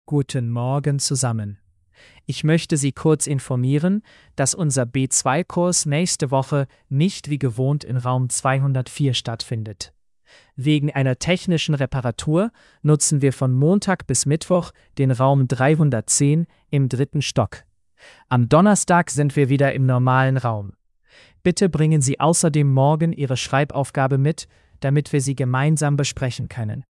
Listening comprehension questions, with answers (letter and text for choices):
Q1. Warum findet der Kurs in einem anderen Raum statt?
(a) Wegen einer Prüfung.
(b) Wegen einer technischen Reparatur.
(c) Wegen eines Feiertags.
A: (b) Wegen einer technischen Reparatur.

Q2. In welchem Raum findet der Kurs von Montag bis Mittwoch statt?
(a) Raum 204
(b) Raum 310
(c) Raum 301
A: (b) Raum 310

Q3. Was sollen die Teilnehmenden morgen mitbringen?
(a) ihre Schreibaufgabe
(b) ihren Ausweis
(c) ihr Kursbuch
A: (a) ihre Schreibaufgabe

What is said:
Guten Morgen zusammen. Ich möchte Sie kurz informieren, dass unser B2-Kurs nächste Woche nicht wie gewohnt in Raum 204 stattfindet. Wegen einer technischen Reparatur nutzen wir von Montag bis Mittwoch den Raum 310 im dritten Stock. Am Donnerstag sind wir wieder im normalen Raum. Bitte bringen Sie außerdem morgen Ihre Schreibaufgabe mit, damit wir sie gemeinsam besprechen können.

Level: B2-Niveau